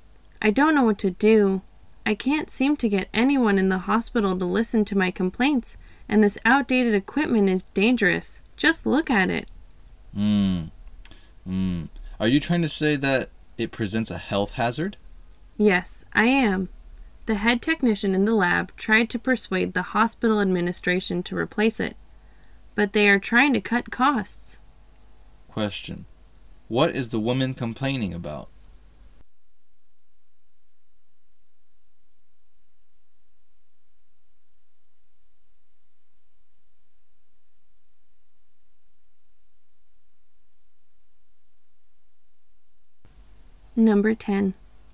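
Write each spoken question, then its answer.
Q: What is the woman complaining about?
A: The hospital's outdated, dangerous equipment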